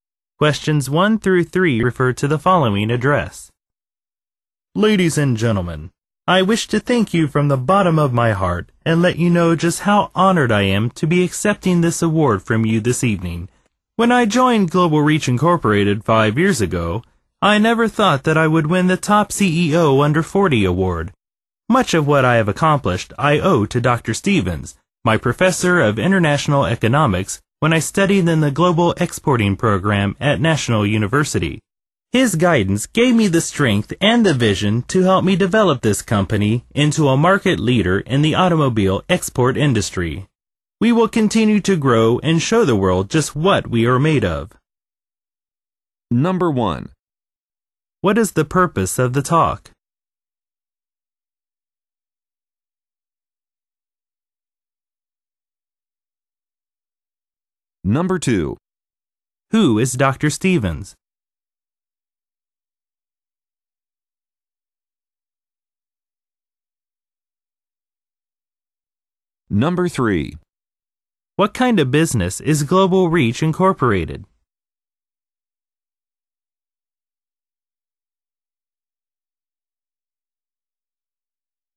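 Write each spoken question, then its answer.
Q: What is the purpose of the talk?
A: To accept an award

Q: Who is Dr. Stevens?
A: The speaker's former professor of international economics

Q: What kind of business is Global Reach Incorporated?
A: An automobile export company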